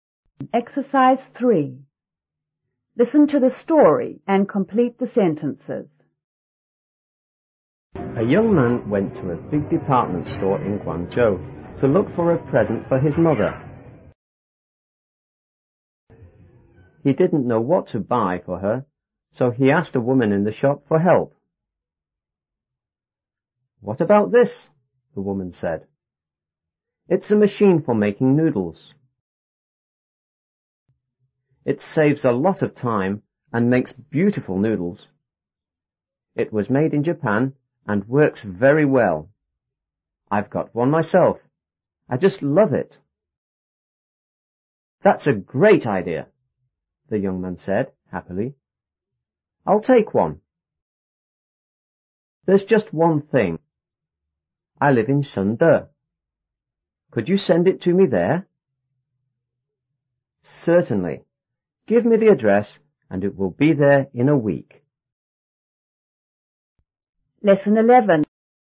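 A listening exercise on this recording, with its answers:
3.Listen to the story and complete the sentences.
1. The machine was recommended by_.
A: a woman in the shop

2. The machine is used for __ .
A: making noodles

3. The machine was made in ___ .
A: Japan

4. The machine will be sent to ______.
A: Shende

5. The machine will be given to ______.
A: the young man's mother

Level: 初中英语广州版5B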